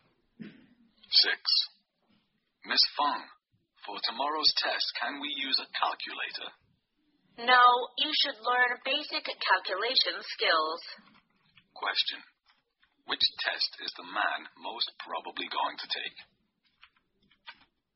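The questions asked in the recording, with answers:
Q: Which test is the man most probably going to take?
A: A math test.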